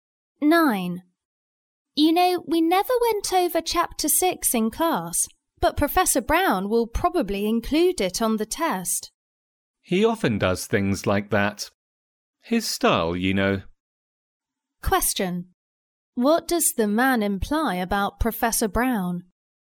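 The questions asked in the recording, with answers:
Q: What does the man imply about Professor Brown?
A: He often tests material not covered in class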